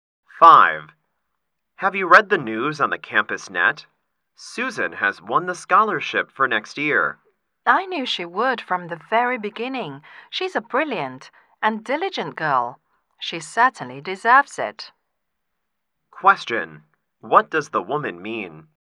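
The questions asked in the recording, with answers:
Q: What does the woman mean?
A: Susan deserves the scholarship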